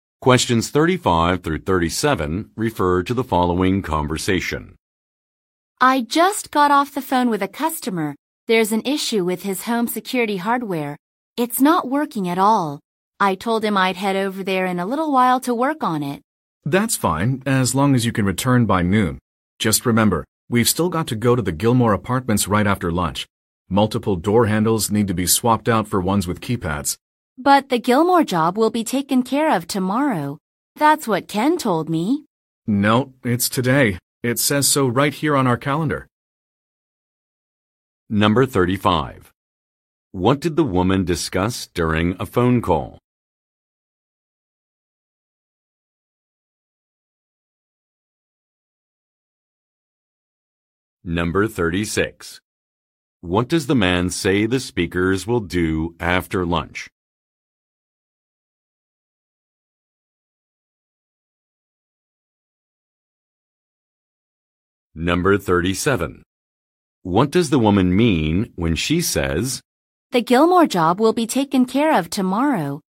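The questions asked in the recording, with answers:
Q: What did the woman discuss during a phone call?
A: A problem with a customer's home security hardware, which isn't working

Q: What does the man say the speakers will do after lunch?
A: Go to the Gilmore Apartments to replace door handles with keypad handles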